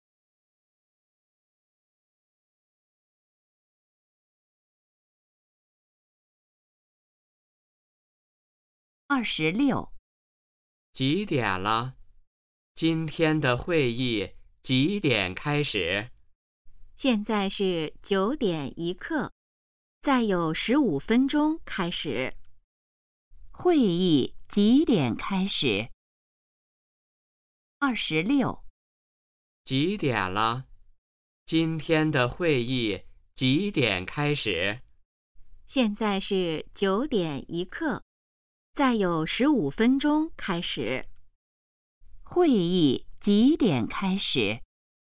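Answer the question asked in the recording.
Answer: 9:16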